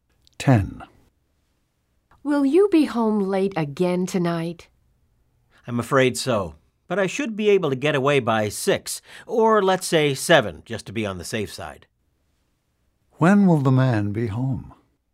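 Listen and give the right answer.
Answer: By 7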